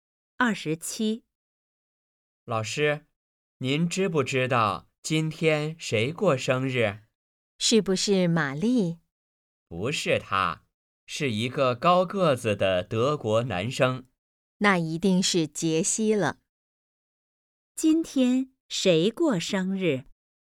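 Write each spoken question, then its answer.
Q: 今天谁过生日?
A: 杰西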